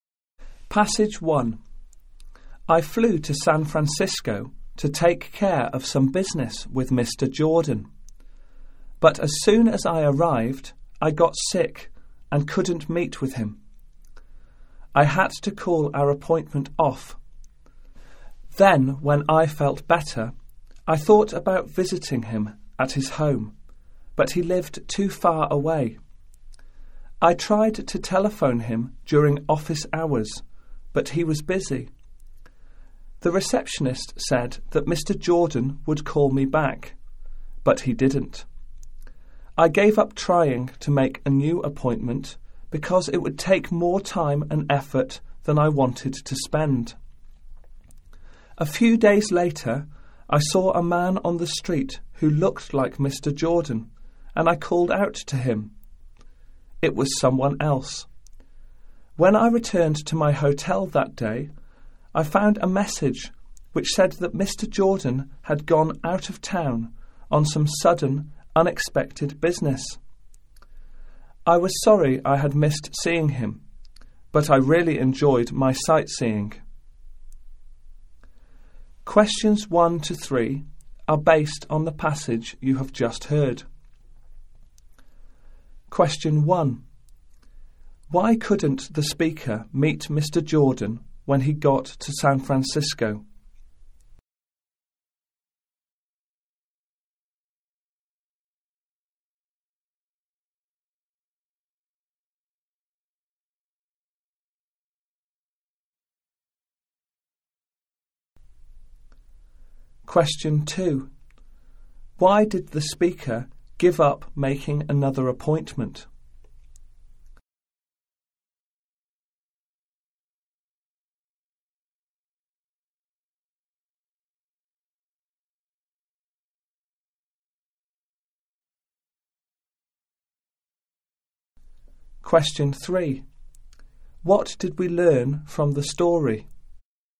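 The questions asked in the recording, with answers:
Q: Why couldn't the speaker meet Mr. Jordan when he got to San Francisco?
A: Because he got sick.

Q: Why did the speaker give up making another appointment?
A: It would take more time and effort than he wanted to spend.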